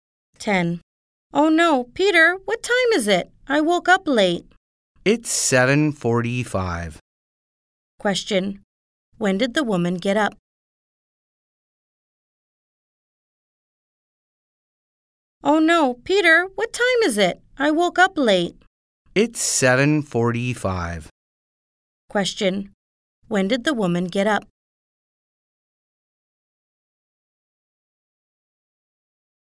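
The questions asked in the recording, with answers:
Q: When did the woman get up?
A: At 7:45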